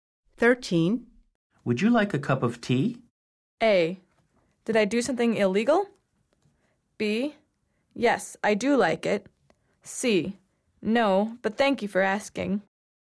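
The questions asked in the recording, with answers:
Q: Would you like a cup of tea?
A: C: No, but thank you for asking.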